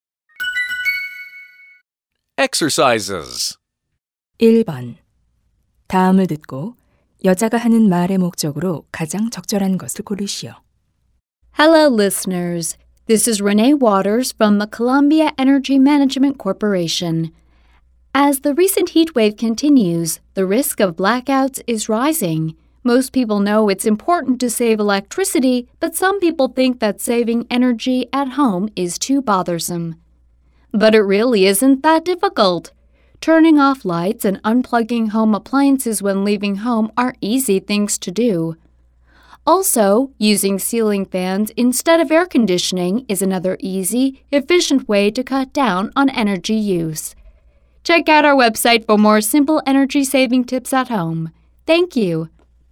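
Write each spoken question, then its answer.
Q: 다음을 듣고 여자가 하는 말의 목적으로 가장 적절한 것을 고르시오.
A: 가정에서 쉽게 에너지를 절약하는 방법을 알려 주려고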